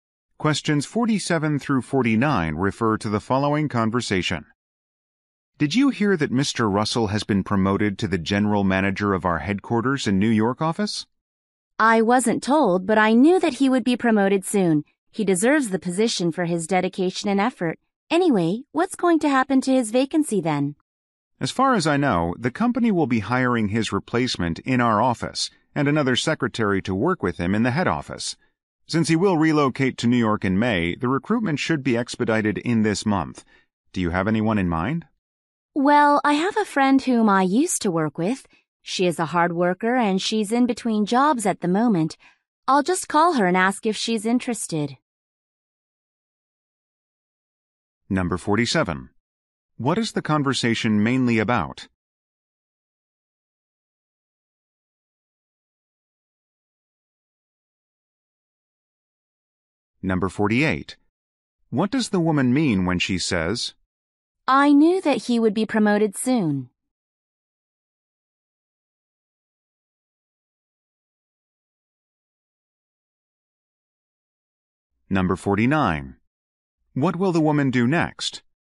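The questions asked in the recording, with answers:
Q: What is the conversation mainly about?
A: Mr. Russell's promotion and his replacement

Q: What does the woman mean when she says,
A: She is not surprised

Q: What will the woman do next?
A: Call her friend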